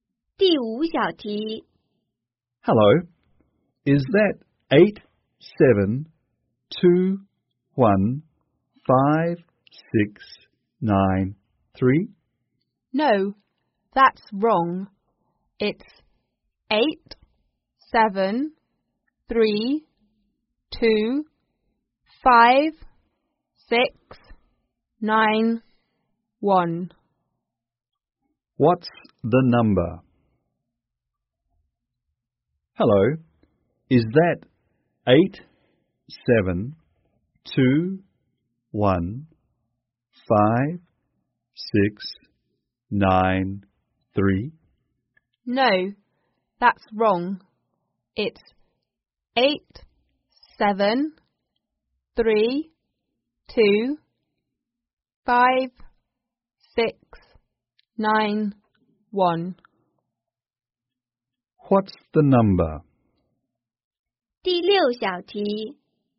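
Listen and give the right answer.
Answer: 87325691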